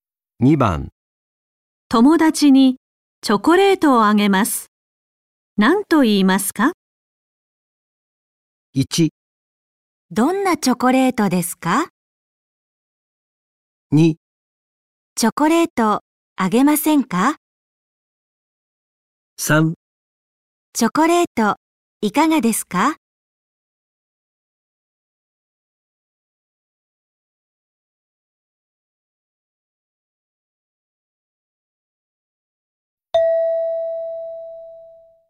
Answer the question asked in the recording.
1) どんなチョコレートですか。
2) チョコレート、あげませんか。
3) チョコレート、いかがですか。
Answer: 3) チョコレート、いかがですか。

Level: N5 Listening · Test 1